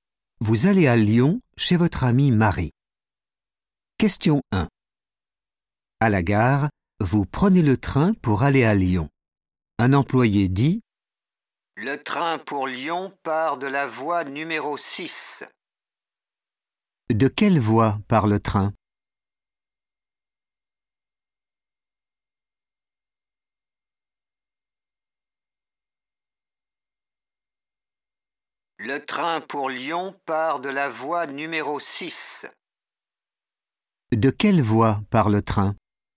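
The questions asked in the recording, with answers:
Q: De quelle voie part le train ?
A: voie numéro 6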